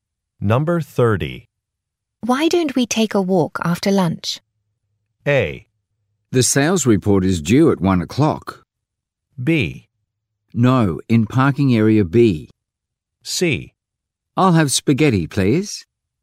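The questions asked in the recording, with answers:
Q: Why don't we take a walk after lunch?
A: A: The sales report is due at 1 o'clock.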